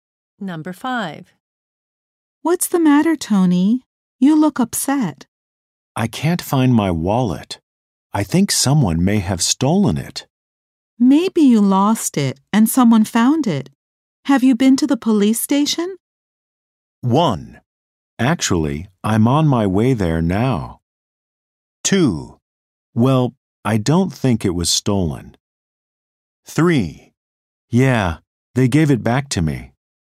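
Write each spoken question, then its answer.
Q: Have you been to the police station?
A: 1: Actually, I'm on my way there now.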